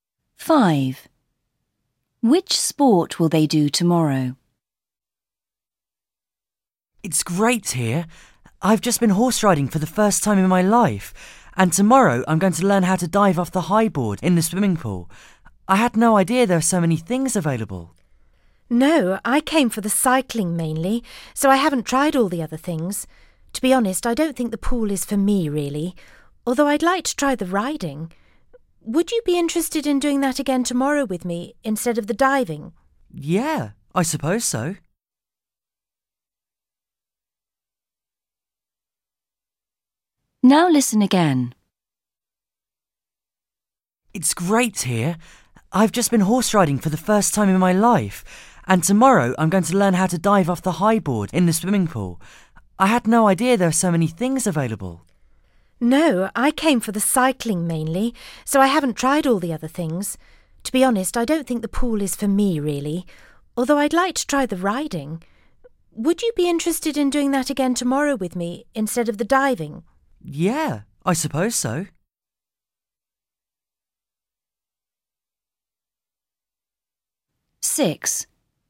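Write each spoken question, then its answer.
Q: Which sport will they do tomorrow?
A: horse riding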